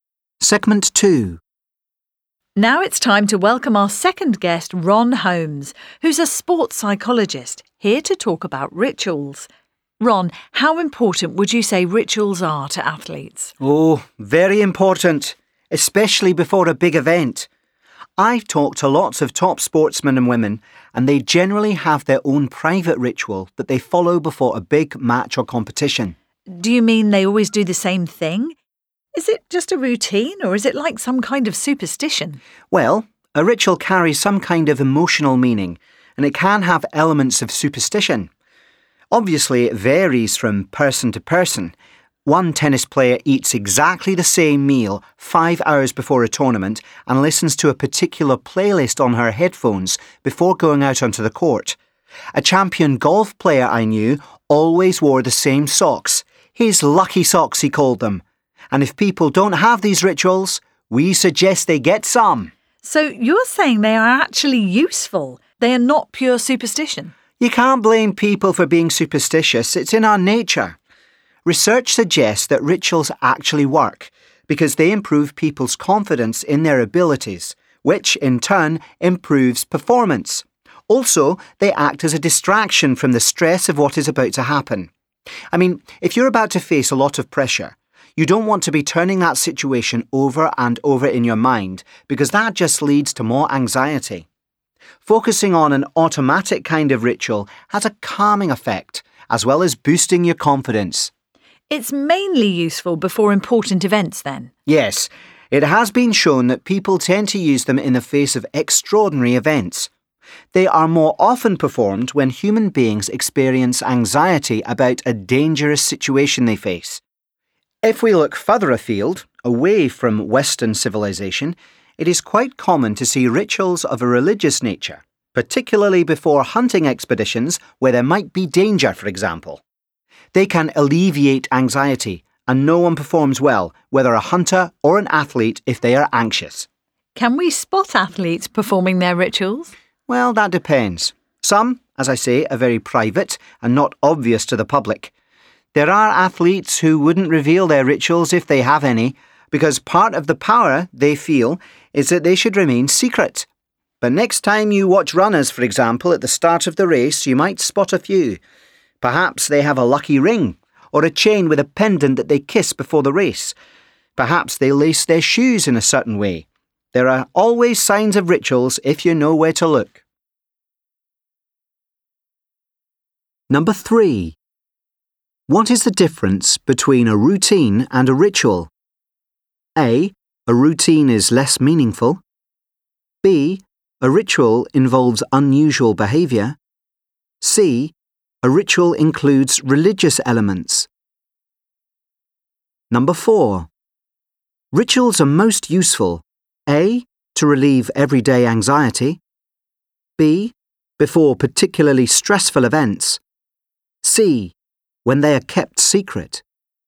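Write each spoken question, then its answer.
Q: What is the difference between a routine and a ritual?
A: A: A routine is less meaningful.

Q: Rituals are most useful.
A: B: Before particularly stressful events.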